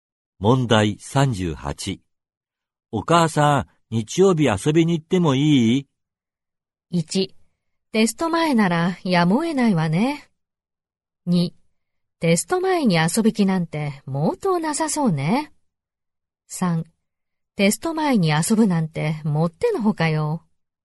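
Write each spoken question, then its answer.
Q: 日曜日遊びに行ってもいい?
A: 3: テスト前に遊ぶなんてもってのほかよ。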